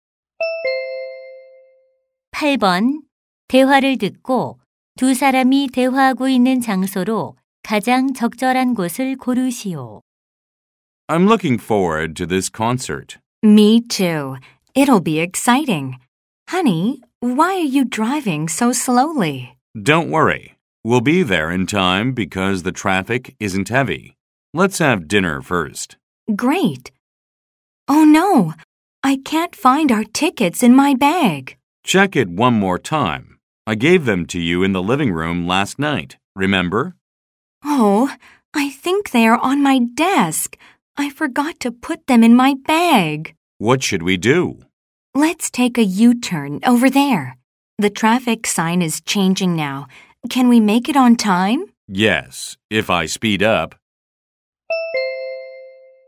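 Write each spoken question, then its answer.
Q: 대화를 듣고 두 사람이 대화하고 있는 장소로 가장 적절한 곳을 고르시오.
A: 자동차 안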